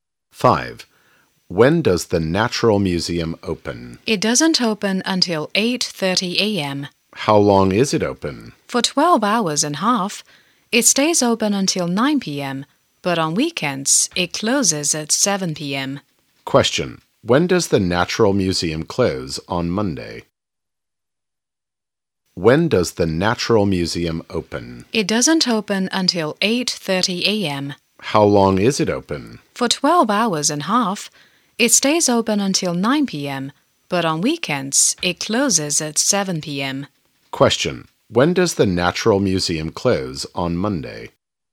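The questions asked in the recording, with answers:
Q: When does the Natural Museum close on Monday?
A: At 9 p.m.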